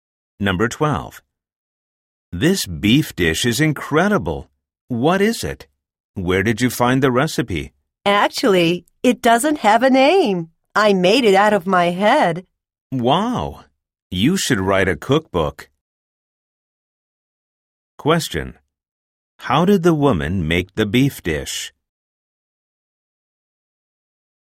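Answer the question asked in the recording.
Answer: She made it up herself, without a recipe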